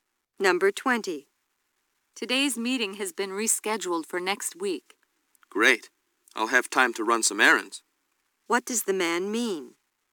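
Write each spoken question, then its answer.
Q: What does the man mean?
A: He's glad because now he has time to run errands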